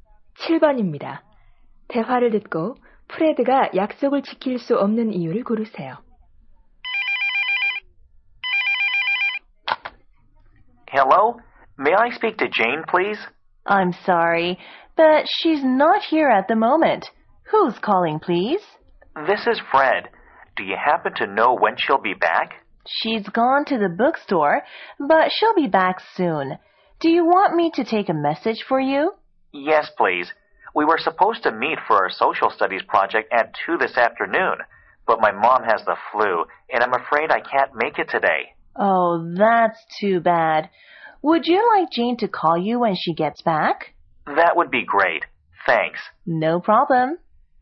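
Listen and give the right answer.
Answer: 엄마가 독감에 걸려서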